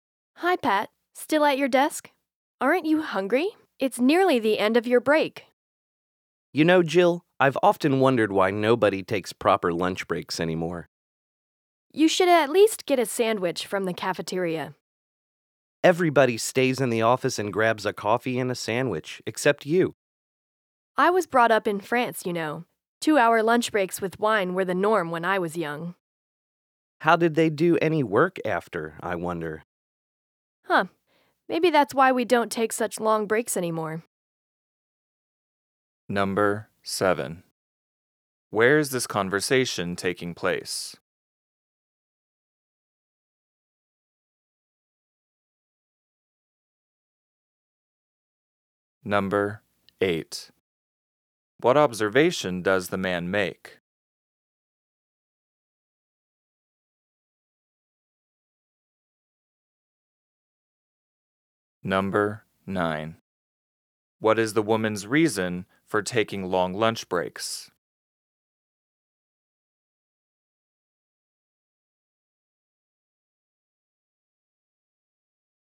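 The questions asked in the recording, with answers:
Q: Where is this conversation taking place?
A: In an office

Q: What observation does the man make?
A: Nobody takes proper lunch breaks anymore

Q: What is the woman's reason for taking long lunch breaks?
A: She was brought up in France, where long lunch breaks were the norm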